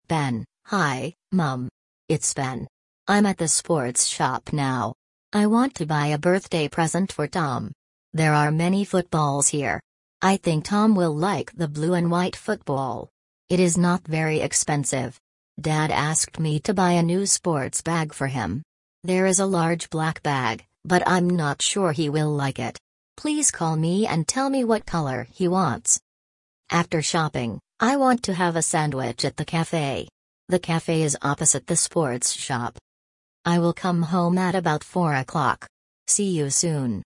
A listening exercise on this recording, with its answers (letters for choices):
Ты услышишь сообщение. Для каждого предложения А–Е выбери один правильный вариант ответа из трёх предложенных: 1, 2 или 3. Ты услышишь текст дважды.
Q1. Who is this message from?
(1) From Ben to his mother.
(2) From Ben's mother to Ben.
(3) From Tom to Ben.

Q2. Where is Ben now?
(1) At the sports shop.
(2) At the supermarket.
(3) At the café.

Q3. What colour is the football for Tom?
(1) Black and white.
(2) Blue and white.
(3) Red and white.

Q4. What does Dad want Ben to buy?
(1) A T-shirt.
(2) A pair of trainers.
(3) A sports bag.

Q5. Where is the café?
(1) Behind the sports shop.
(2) Opposite the sports shop.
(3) Next to the sports shop.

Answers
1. 1
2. 1
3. 2
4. 3
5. 2

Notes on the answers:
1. Сообщение отправляет Ben своей маме: «Hi, Mum! It's Ben».
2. Ben находится в спортивном магазине.
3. Он хочет купить для Tom сине-белый футбольный мяч.
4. Отец попросил купить новую спортивную сумку.
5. Кафе находится напротив спортивного магазина.

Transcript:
Ben: Hi, Mum! It's Ben. I'm at the sports shop now. I want to buy a birthday present for Tom.
There are many footballs here. I think Tom will like the blue and white football. It is not very expensive.
Dad asked me to buy a new sports bag for him. There is a large black bag, but I'm not sure he will like it. Please call me and tell me what colour he wants.
After shopping, I want to have a sandwich at the café. The café is opposite the sports shop.
I will come home at about four o'clock. See you soon!

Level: 4 класс